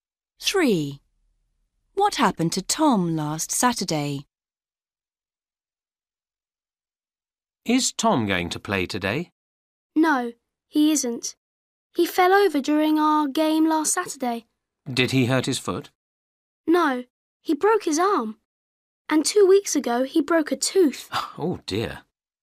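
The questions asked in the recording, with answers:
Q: What happened to Tom last Saturday?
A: he broke his arm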